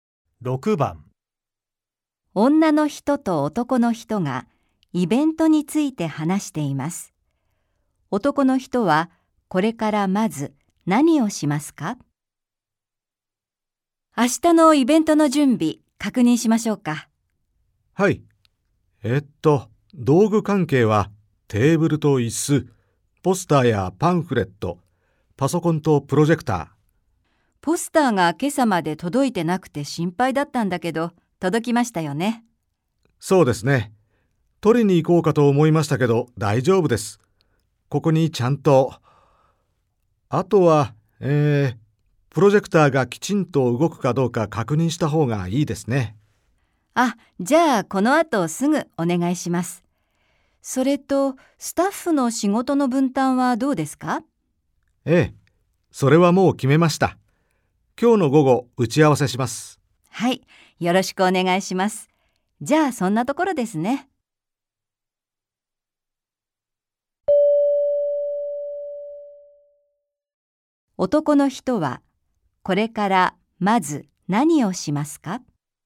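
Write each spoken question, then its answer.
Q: 男の人は、これからまず何をしますか?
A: プロジェクターがきちんと動くか確認する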